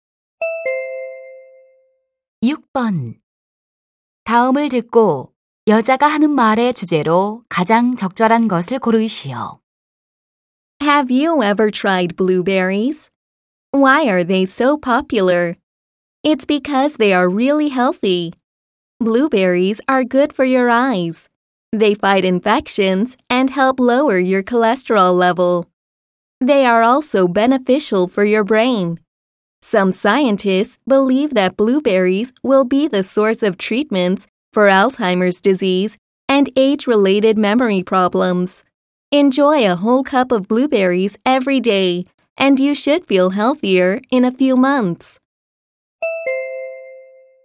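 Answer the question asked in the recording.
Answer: 블루베리의 건강상 이점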